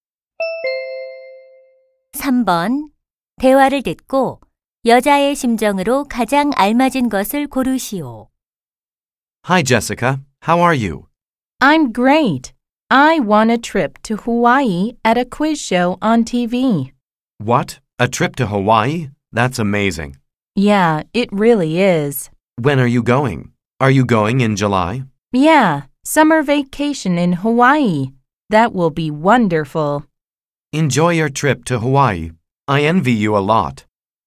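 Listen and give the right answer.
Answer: 기쁘고 신남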